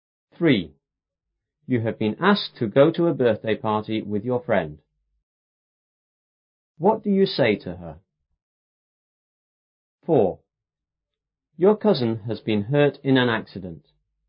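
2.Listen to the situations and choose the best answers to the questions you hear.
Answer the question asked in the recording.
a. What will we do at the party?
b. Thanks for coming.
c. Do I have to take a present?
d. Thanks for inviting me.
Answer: d. Thanks for inviting me.

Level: 初中英语广州版5B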